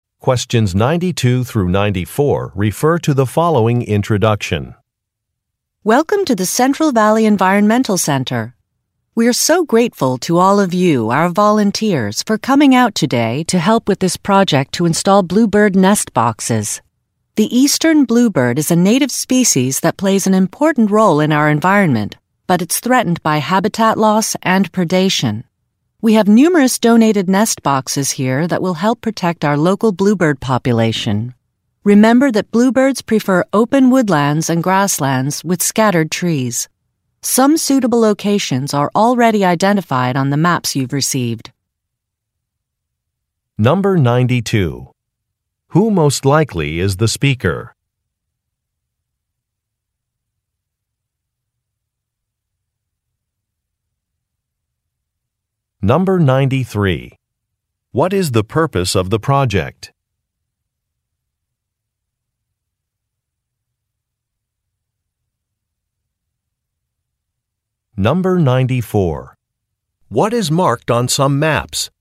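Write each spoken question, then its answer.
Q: What is the purpose of the project?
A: To install bluebird nest boxes to protect the local bluebird population

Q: What is marked on some maps?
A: Suitable locations for the nest boxes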